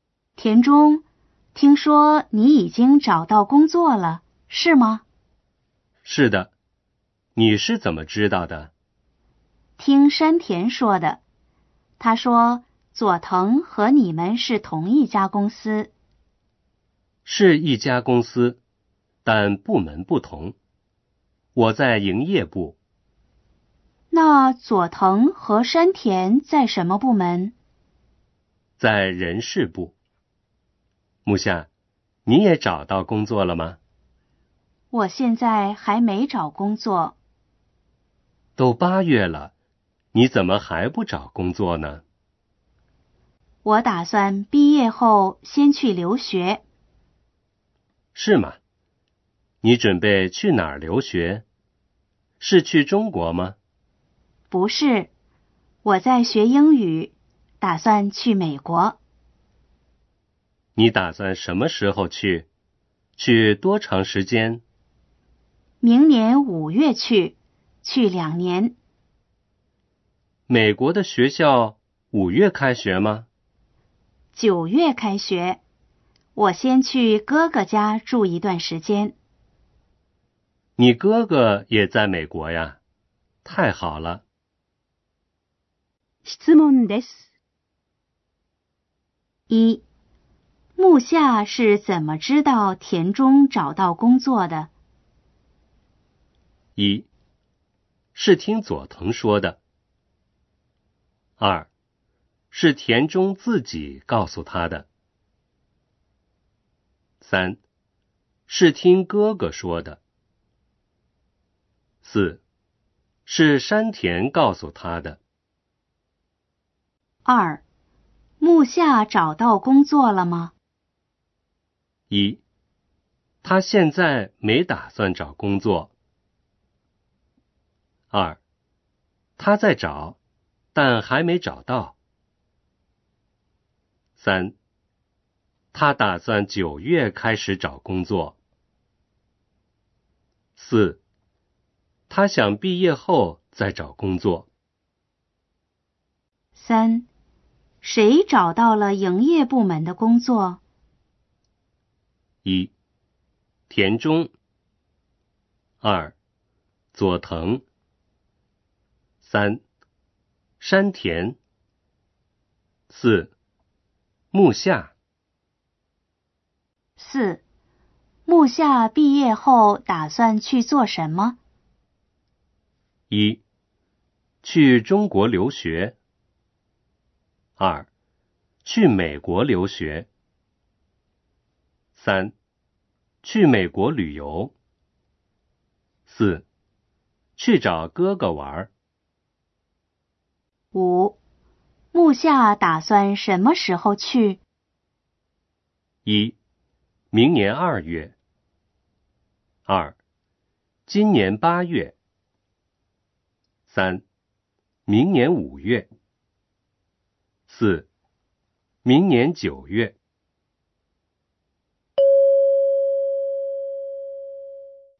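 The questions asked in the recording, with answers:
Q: 木下是怎么知道田中找到工作的?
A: 四: 是山田告诉他的。

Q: 谁找到了营业部门的工作?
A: 一: 田中。

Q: 木下毕业后打算去做什么?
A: 二: 去美国留学。

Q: 木下打算什么时候去?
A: 三: 明年五月。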